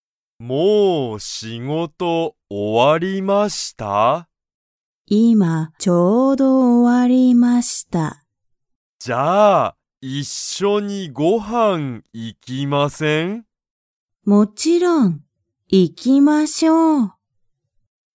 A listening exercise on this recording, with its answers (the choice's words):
小林(こばやし)さんと中田(なかた)さんは、一緒(いっしょ)に____に行(い)く。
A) 学校(がっこう)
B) ご飯(はん)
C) 会社(かいしゃ)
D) ところ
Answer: ご飯(はん)

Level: Level 1